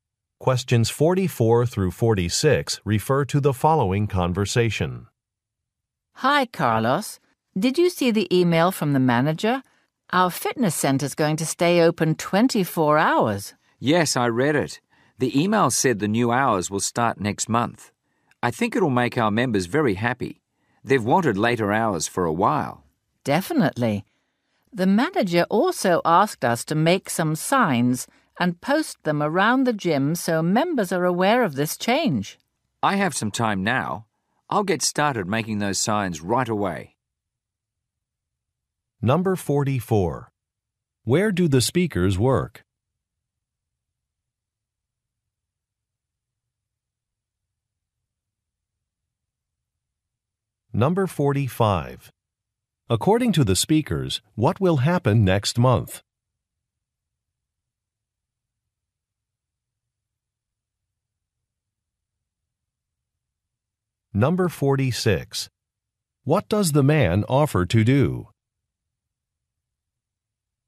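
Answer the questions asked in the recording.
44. At a fitness center
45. The fitness center will start staying open 24 hours
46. Make signs about the new hours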